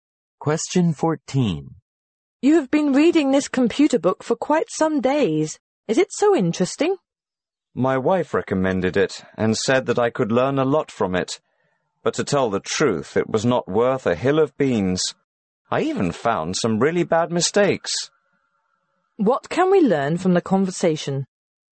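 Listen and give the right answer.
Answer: The man thinks the computer book is worthless and full of mistakes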